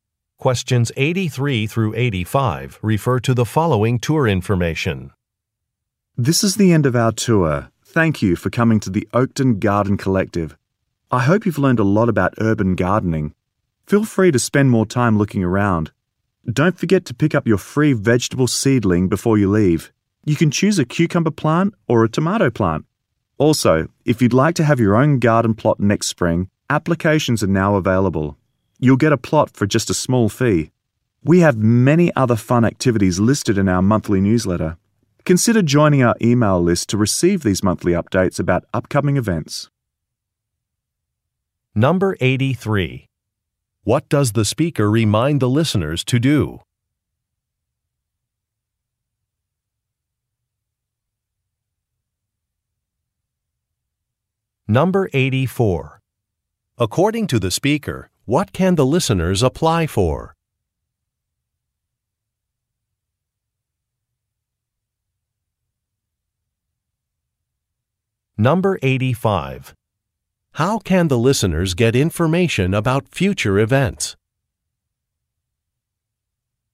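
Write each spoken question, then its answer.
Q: What does the speaker remind the listeners to do?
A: Pick up a free vegetable seedling

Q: According to the speaker, what can the listeners apply for?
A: A garden plot next spring

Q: How can the listeners get information about future events?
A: Join the email list for the monthly newsletter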